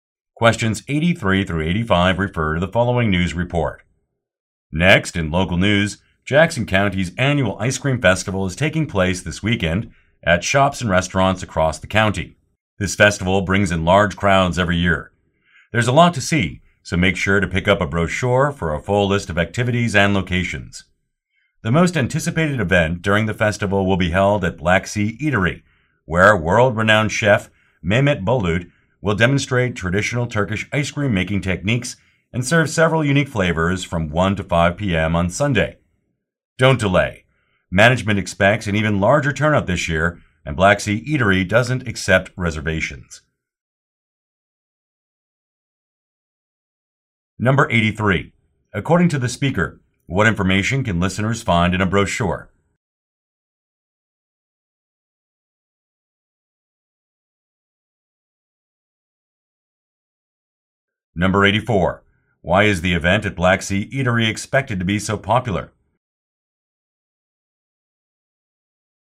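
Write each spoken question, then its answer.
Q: According to the speaker, what information can listeners find in a brochure?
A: A full list of activities and locations

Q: Why is the event at Black Sea Eatery expected to be so popular?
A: A world-renowned chef will demonstrate Turkish ice cream making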